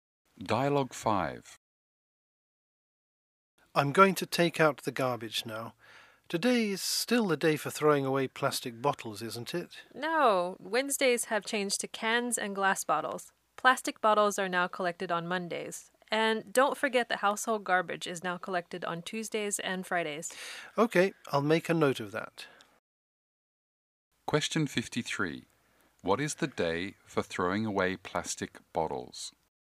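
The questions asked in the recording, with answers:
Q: What is the day for throwing away plastic bottles?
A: Monday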